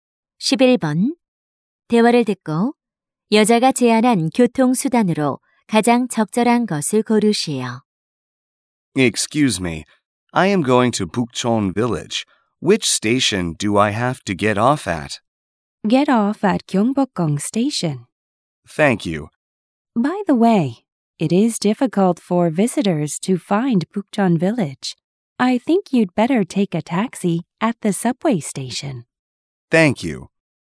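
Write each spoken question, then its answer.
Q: 대화를 듣고 여자가 제안한 교통수단으로 가장 적절한 것을 고르시오.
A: 택시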